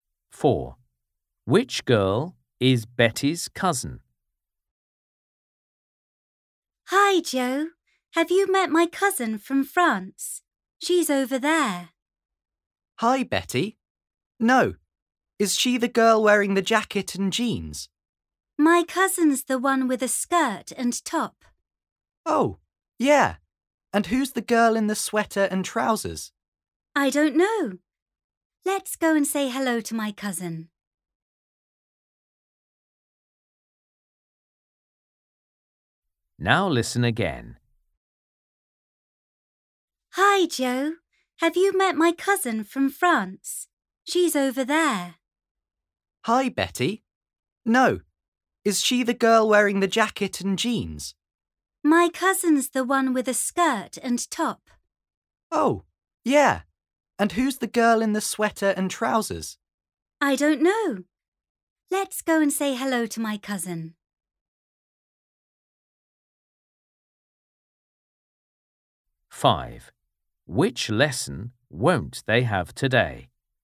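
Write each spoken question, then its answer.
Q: Which girl is Betty's cousin?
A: the one with a skirt and top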